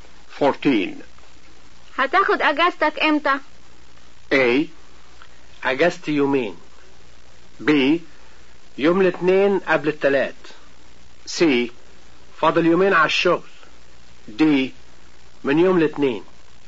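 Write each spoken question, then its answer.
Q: هتاخد اجازتك امتى؟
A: D: من يوم الاثنين.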